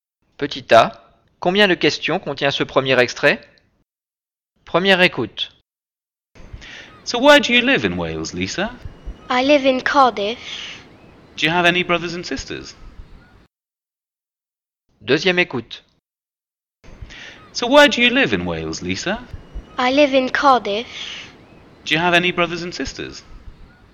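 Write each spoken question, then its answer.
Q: combien de questions contient ce premier extrait?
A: Deux questions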